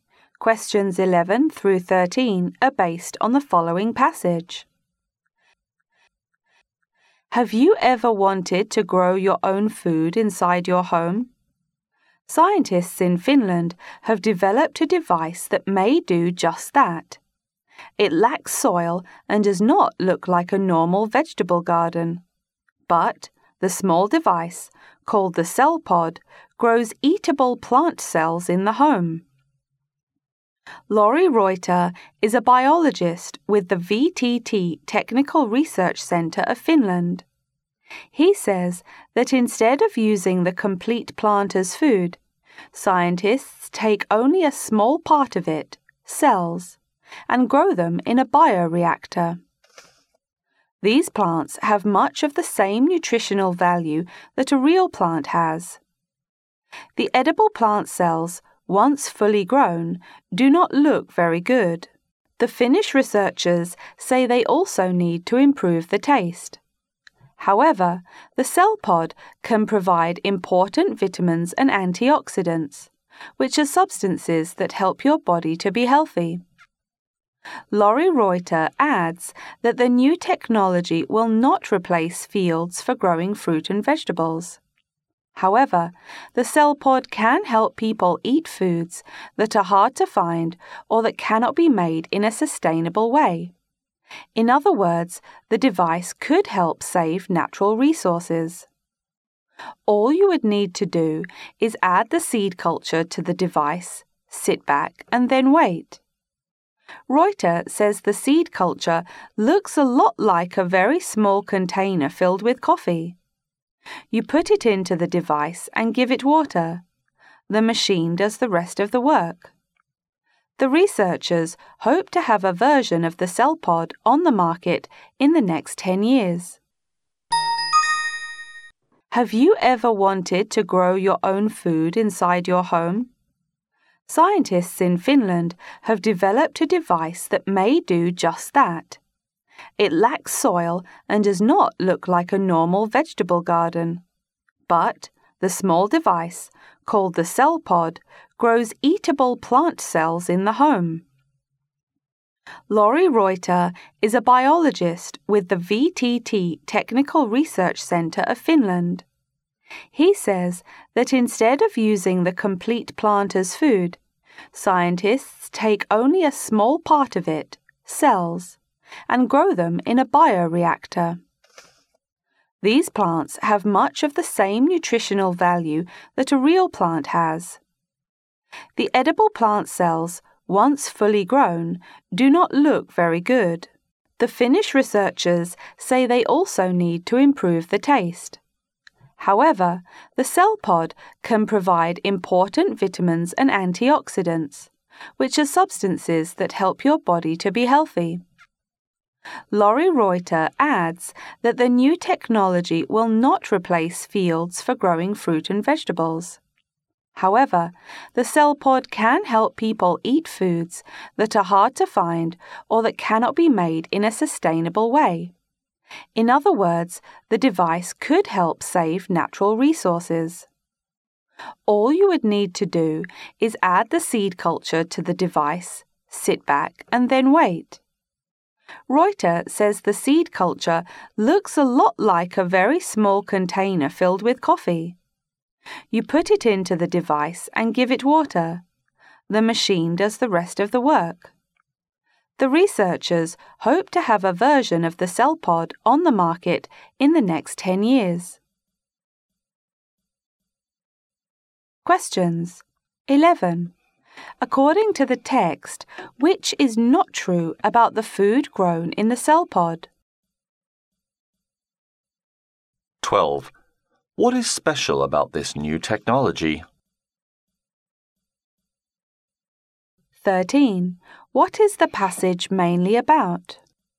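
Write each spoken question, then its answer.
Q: What is special about this new technology?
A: It grows edible plant cells at home without soil

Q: What is the passage mainly about?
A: A device that grows food inside the home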